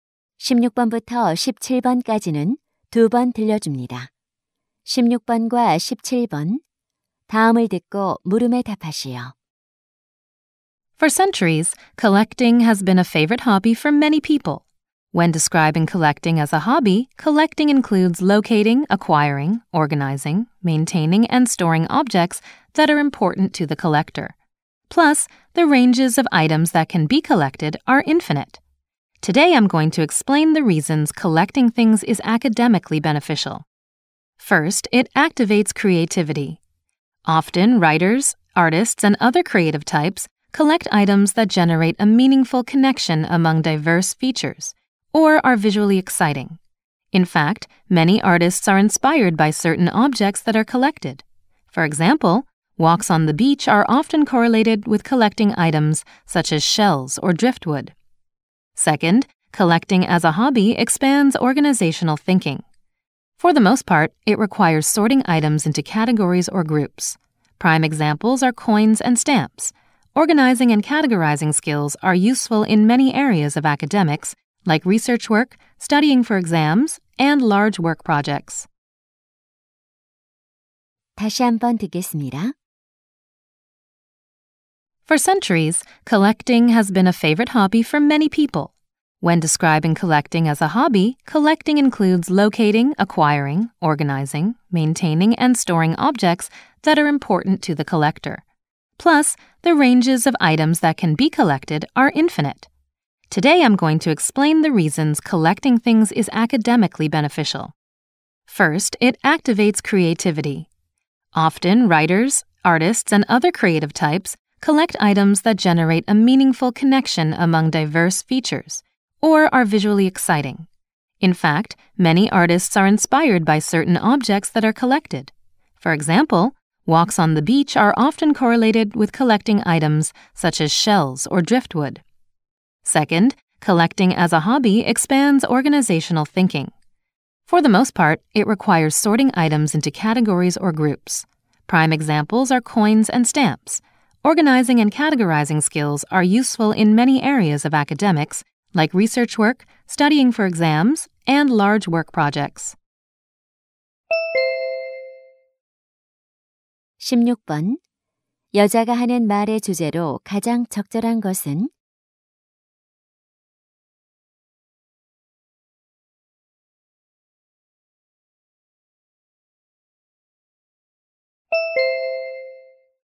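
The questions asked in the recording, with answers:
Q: 여자가 하는 말의 주제로 가장 적절한 것은?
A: 수집 취미의 학업상 이점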